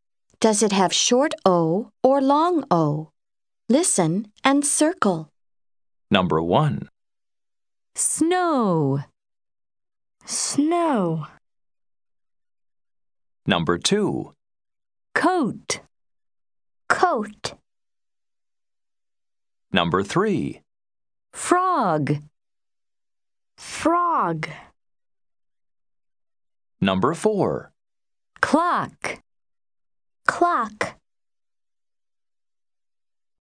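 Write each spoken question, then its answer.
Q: Snow.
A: long O

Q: Coat.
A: long O

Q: Frog.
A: short O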